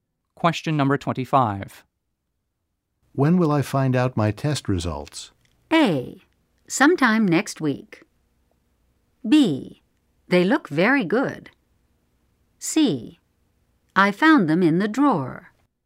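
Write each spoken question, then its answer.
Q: When will I find out my test results?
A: A: Sometime next week.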